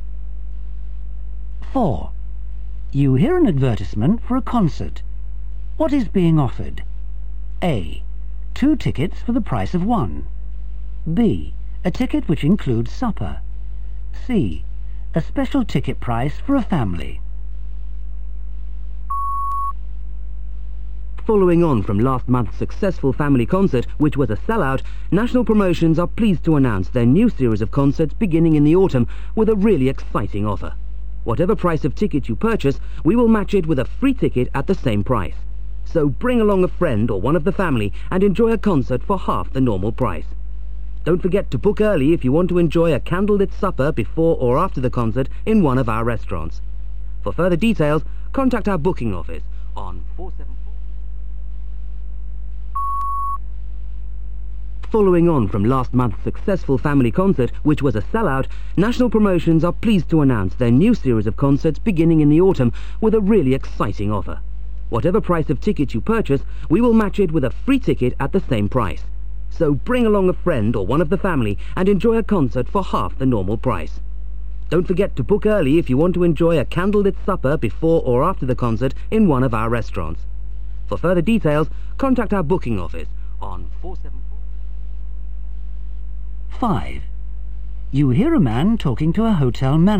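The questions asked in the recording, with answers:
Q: What is being offered?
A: A: 2 tickets for the price of 1.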